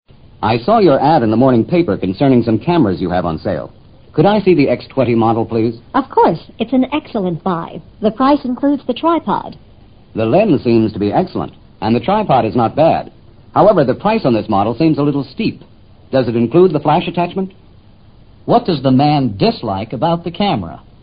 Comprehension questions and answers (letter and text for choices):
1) What does the man dislike about the camera?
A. The model.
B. The lens.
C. The price.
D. The flash attachment.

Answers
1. C. The price.

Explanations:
However, the price on this model seems a little steep 提供了重要的信息。steep作"难以接受的";"不合理的"解。这个词表明了他的态度。model:型号。an excellent buy: 很划算的买卖。tripod: 三角架。lens: (像机的)镜头。flash attachment: 闪光灯的附件。